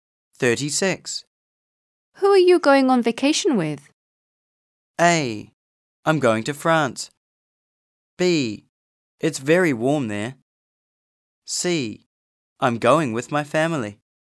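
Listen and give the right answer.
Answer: C: I'm going with my family.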